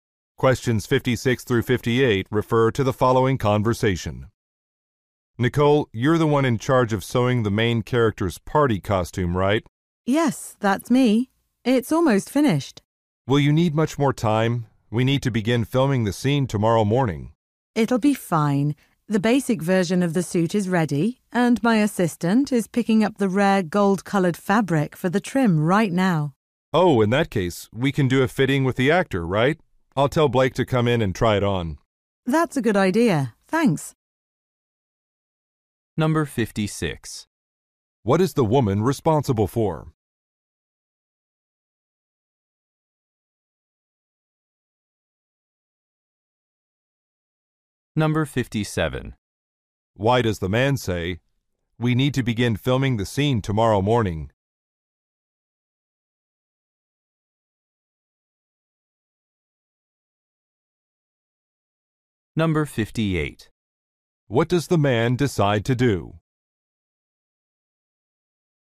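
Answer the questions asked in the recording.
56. Sewing a costume
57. He is worried the costume won't be ready in time
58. Have the actor come in for a fitting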